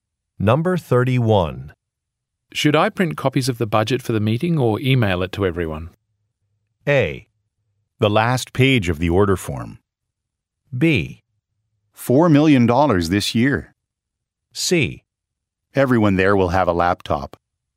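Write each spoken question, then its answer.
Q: Should I print copies of the budget for the meeting or email it to everyone?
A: C: Everyone there will have a laptop.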